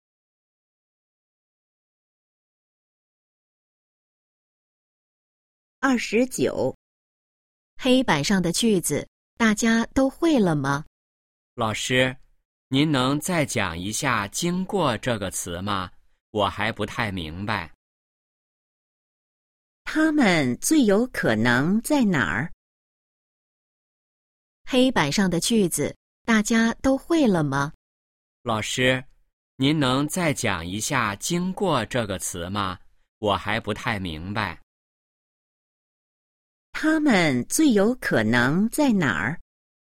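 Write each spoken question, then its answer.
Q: 他们最有可能在哪儿?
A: 教室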